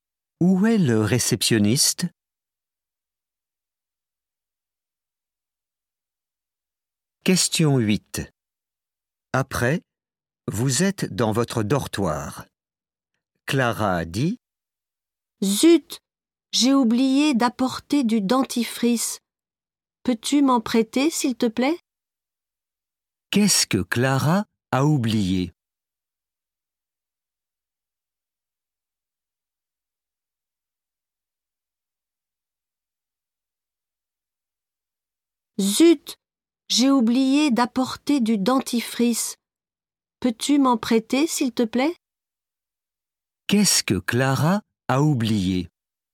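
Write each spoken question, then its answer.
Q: Qu'est-ce que Clara a oublié?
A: Du dentifrice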